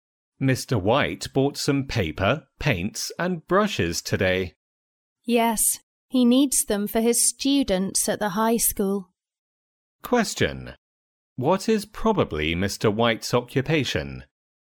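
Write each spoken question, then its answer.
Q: What is probably Mr. White's occupation?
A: A high school teacher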